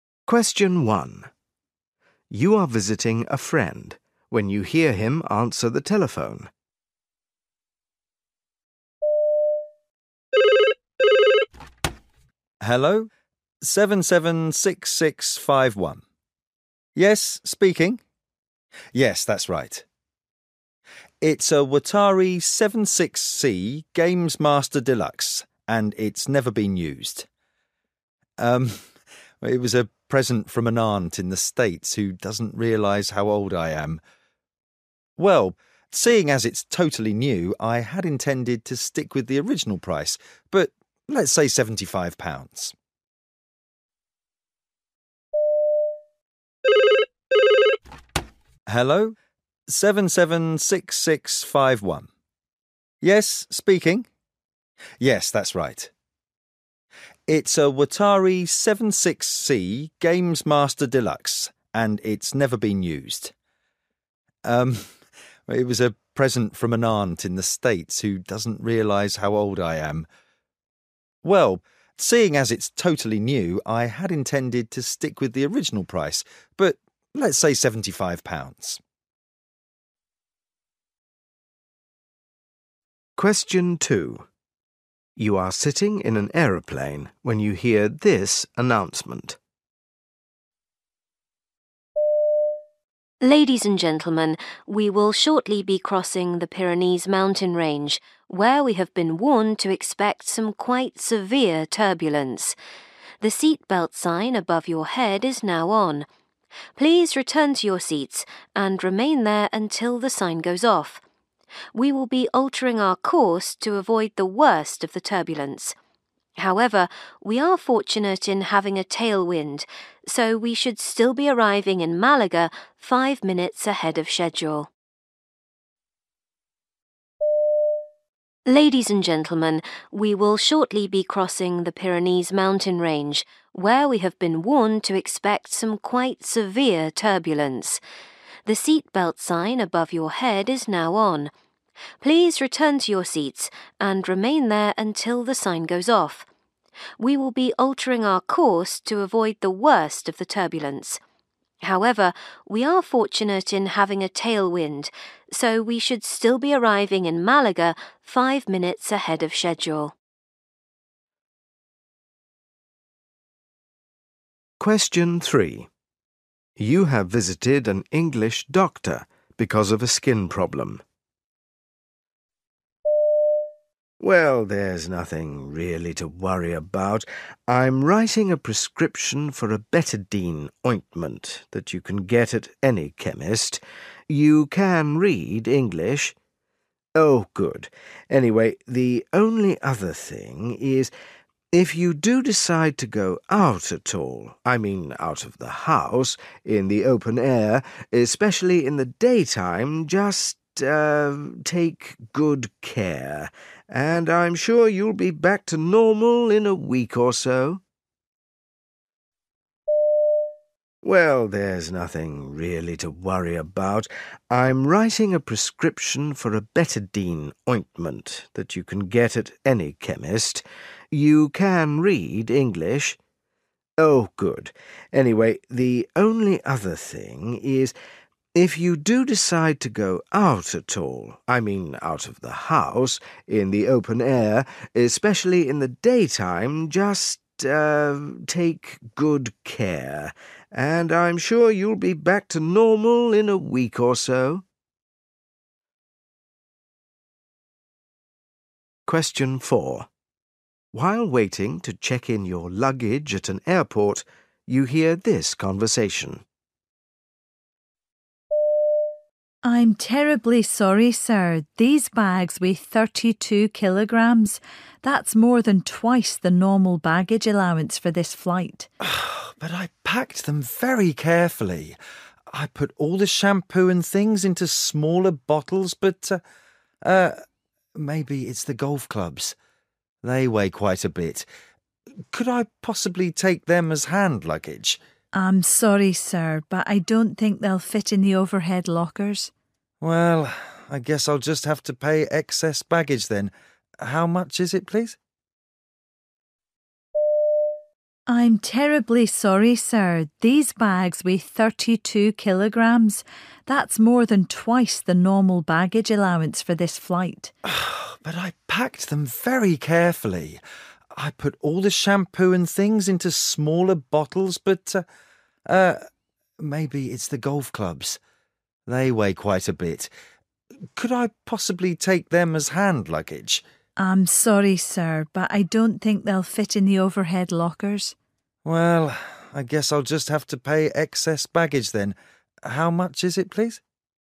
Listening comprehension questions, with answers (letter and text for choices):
You will hear people talking in eight different situations. For questions 1-8, choose the best answer (A, B or C).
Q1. The caller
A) agrees to sell something.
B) agrees to buy something from the speaker.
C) changes his/her mind.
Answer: B) agrees to buy something from the speaker.

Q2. When will your flight be arriving?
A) late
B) on time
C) early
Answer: C) early

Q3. For a quick recovery you should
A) travel by car.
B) not go out in the daytime.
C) be careful when you are outside.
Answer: C) be careful when you are outside.

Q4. On the flight, what are you normally allowed?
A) 15 kg of luggage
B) 16 kg of luggage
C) 30 kg of luggage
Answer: A) 15 kg of luggage

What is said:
1 You are visiting a friend when you hear him answer the telephone.
Hello, 776651 ... Yes, speaking.. Yes, that's right ... It's a Wattari 76C Gamemaster Deluxe and it's never been used ... erm, it was a present from an aunt in the States who doesn't realise how old I am ... Well, seeing as it's totally new, I had intended to stick with the original price but let's say 75 pounds.
2 You are sitting in an aeroplane when you hear this announcement.
Ladies and gentlemen, we will shortly be crossing the Pyrenees mountain range where we have been warned to expect some quite severe turbulence. The seat-belt sign above your head is now on. Please return to your seats and remain there until the sign goes off. We will be altering our course to avoid the worst of the turbulence. However, we are fortunate in having a tail wind so we should still be arriving in Malaga five minutes ahead of schedule.
3 You have visited an English doctor because of a skin problem.
Well, there's nothing really to worry about. I'm writing a prescription for a betadine ointment that you can get at any chemist. You can read English? Oh, good. Anyway, the only other thing is ... if you do decide to go out at all – I mean, out of the house – in the open air, especially in the daytime, just ... take good care, and I'm sure you'll be back to normal in a week or so.
4 While waiting to check in your luggage at an airport, you hear this conversation.
W: I'm terribly sorry, sir, these bags weigh 32 kilograms. That's more than twice the normal baggage allowance for this flight.
M: Ah, but I packed them very carefully. I put all the shampoo and things into smaller bottles, but ... maybe it's the golf clubs ... they weigh quite a bit. Could I possibly take them as hand luggage?
W: I'm sorry, sir, but I don't think they'll fit in the overhead lockers.
M: Well, I guess I'll just have to pay excess baggage then. How much is it please?